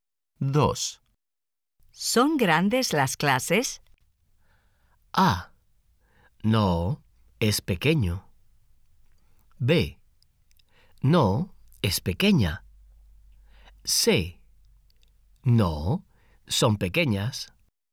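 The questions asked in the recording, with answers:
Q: ¿Son grandes las clases?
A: C: No, son pequeñas.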